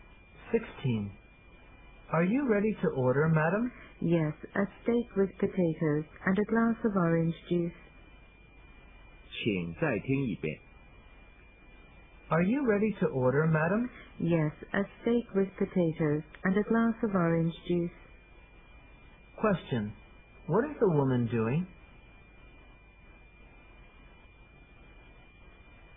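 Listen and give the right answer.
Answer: Ordering food in a restaurant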